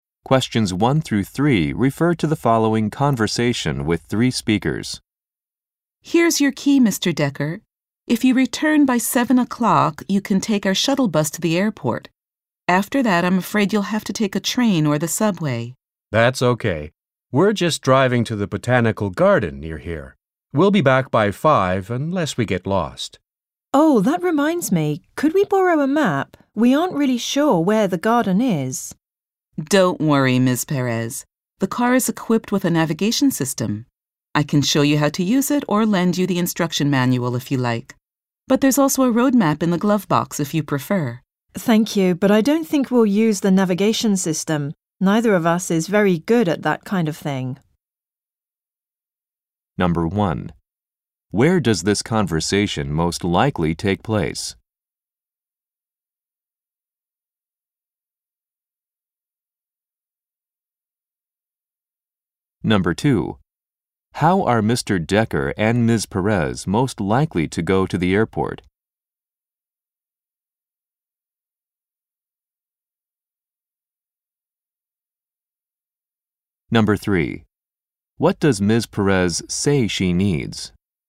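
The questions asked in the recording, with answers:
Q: How are Mr. Decker and Ms. Perez most likely to go to the airport?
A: By the shuttle bus

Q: What does Ms. Perez say she needs?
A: A map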